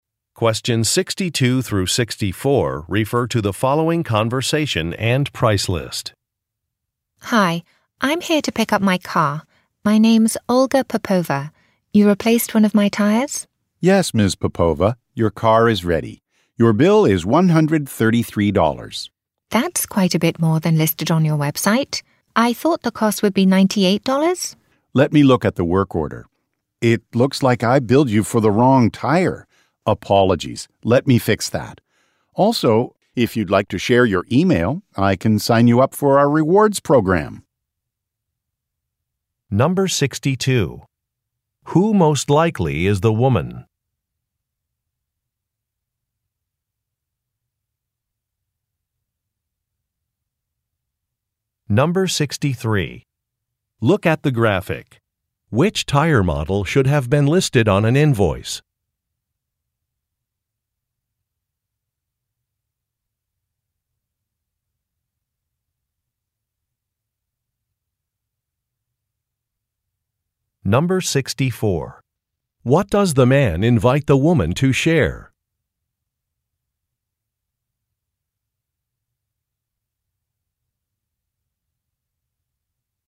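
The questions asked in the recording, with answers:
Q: Who most likely is the woman?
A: A customer picking up her car after a tire replacement

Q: What does the man invite the woman to share?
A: Her email address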